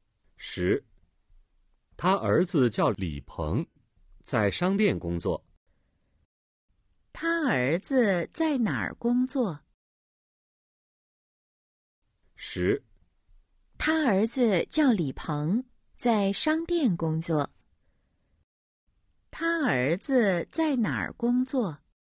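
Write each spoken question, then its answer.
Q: 他儿子在哪儿工作?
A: 在商店工作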